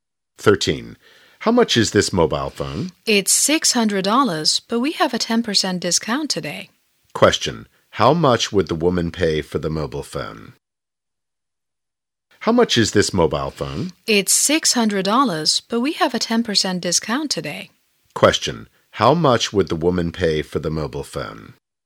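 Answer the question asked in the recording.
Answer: $540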